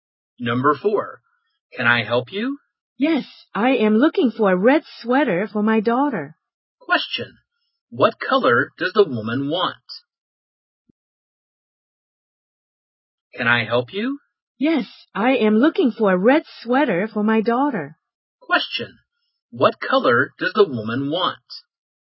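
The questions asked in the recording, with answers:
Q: what color does the woman want?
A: Red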